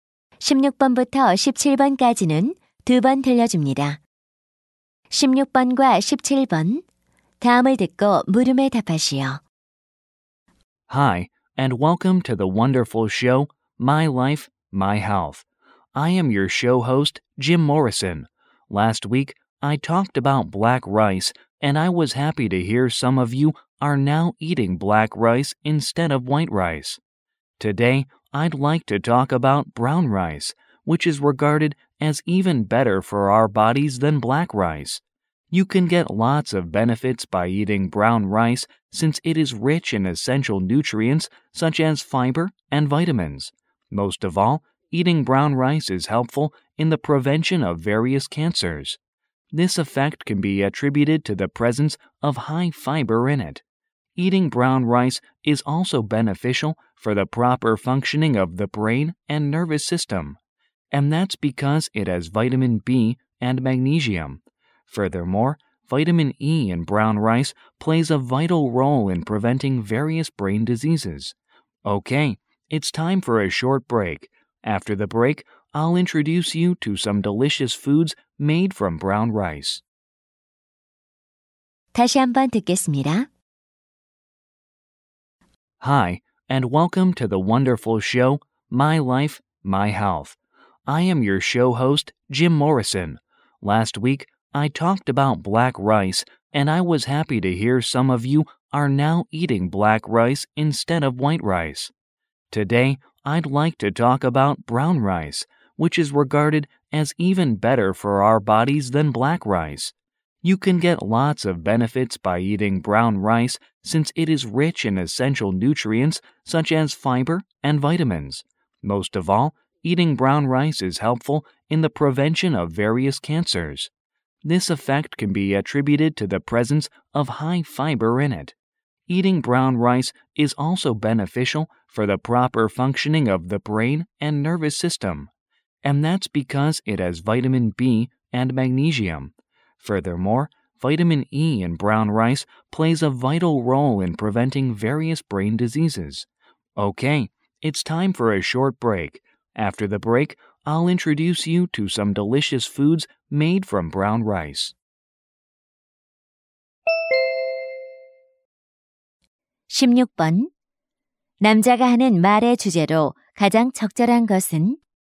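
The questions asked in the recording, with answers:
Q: 남자가 하는 말의 주제로 가장 적절한 것은?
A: 현미를 먹는 것의 건강상 이점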